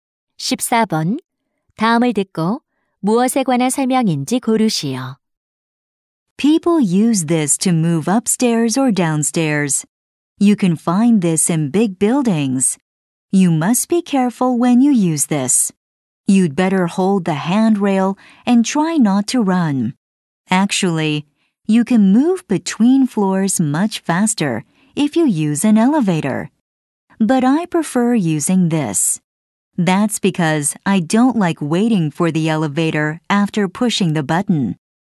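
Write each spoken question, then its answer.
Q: 다음을 듣고 무엇에 관한 설명인지 고르시오.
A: 에스컬레이터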